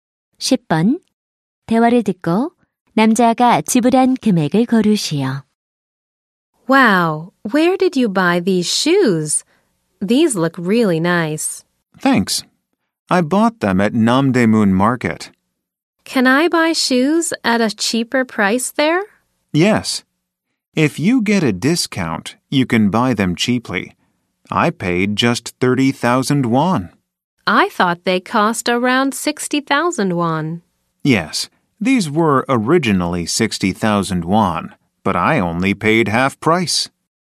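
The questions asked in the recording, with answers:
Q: 대화를 듣고 남자가 지불한 금액을 고르시오.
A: 30,000원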